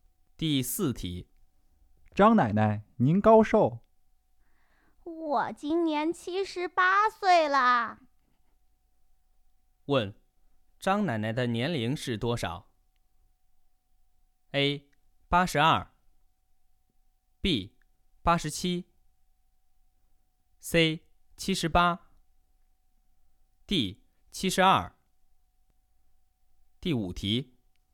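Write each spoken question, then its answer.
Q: 问,张奶奶的年龄是多少?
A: C: 78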